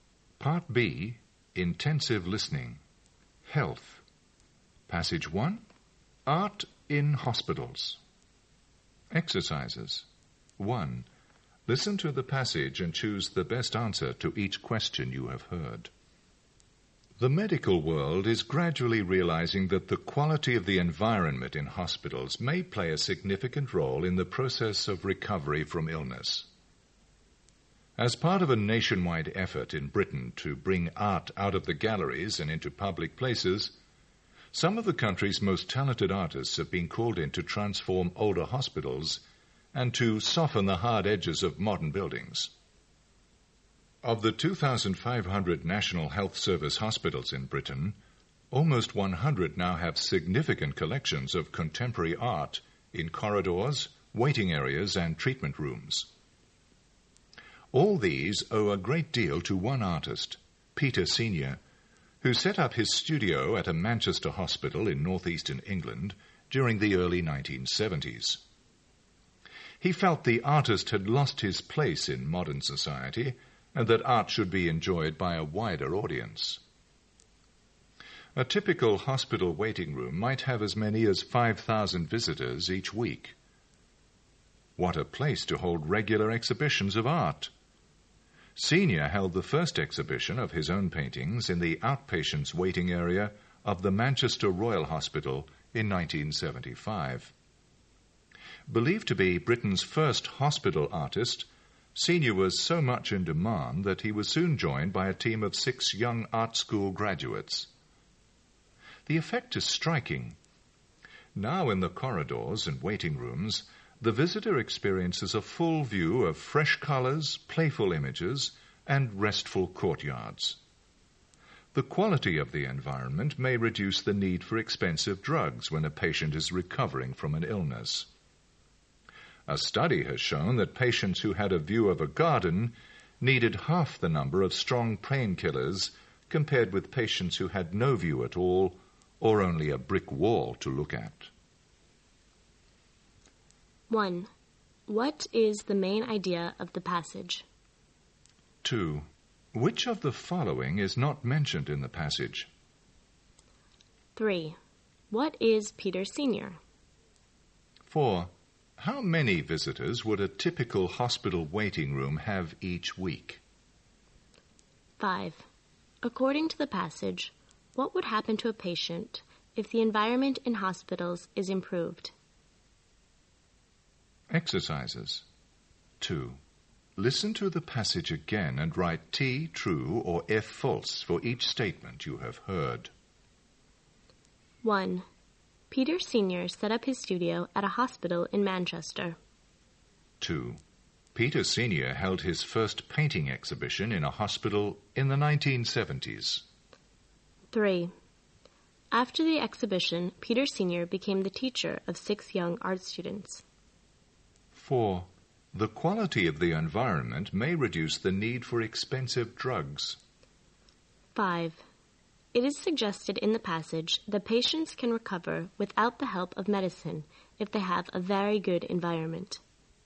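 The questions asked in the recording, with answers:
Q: What is the main idea of the passage?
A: Art in hospitals can help patients recover

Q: What is Peter Senior?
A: An artist, believed to be Britain's first hospital artist

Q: How many visitors would a typical hospital waiting room have each week?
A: As many as 5,000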